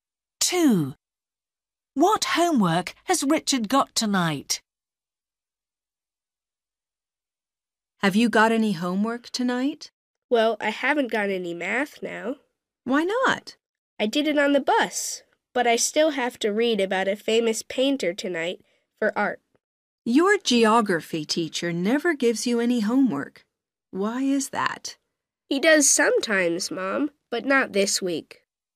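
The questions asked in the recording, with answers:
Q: What homework has Richard got tonight?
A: reading about a famous painter for art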